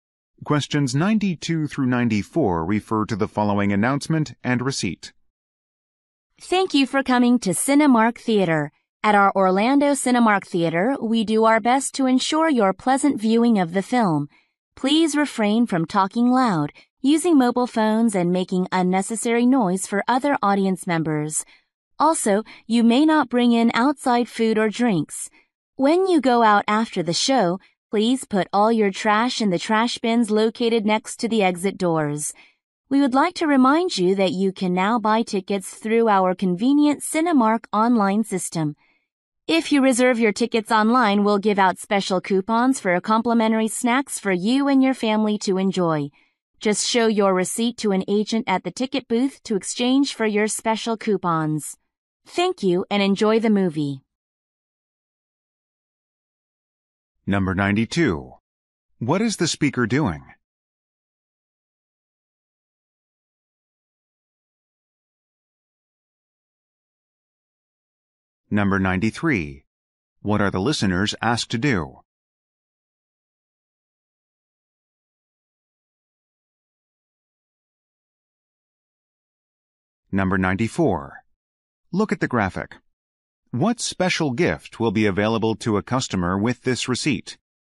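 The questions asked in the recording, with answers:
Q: What is the speaker doing?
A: Giving theater guidelines before a movie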